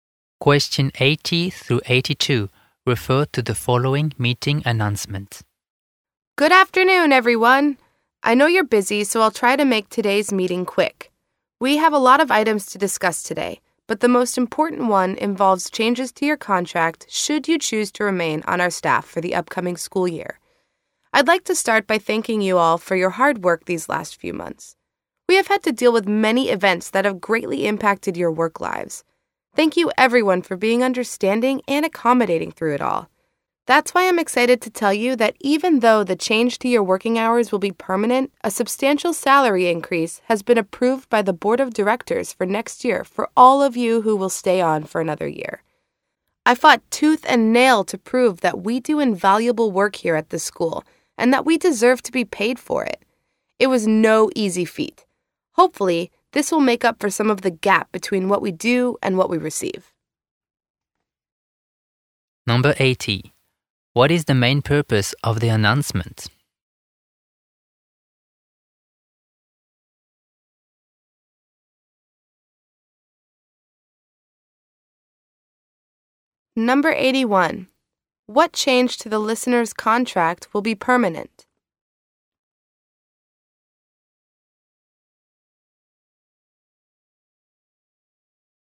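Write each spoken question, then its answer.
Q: What is the main purpose of the announcement?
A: To announce contract changes, including a salary increase

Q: What change to the listener's contract will be permanent?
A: The change to their working hours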